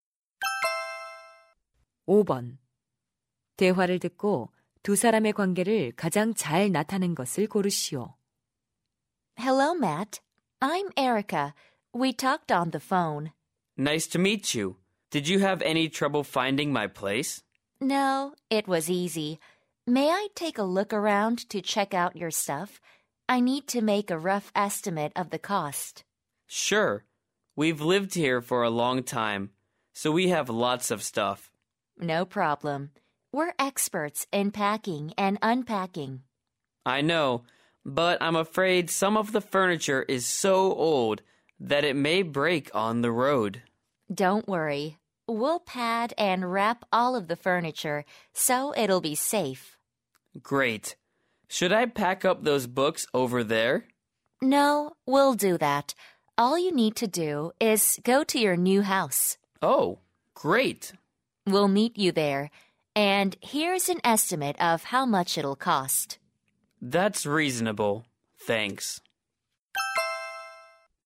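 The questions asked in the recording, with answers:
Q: 대화를 듣고 두 사람의 관계를 가장 잘 나타낸 것을 고르시오.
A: 이삿짐 업체 직원 - 고객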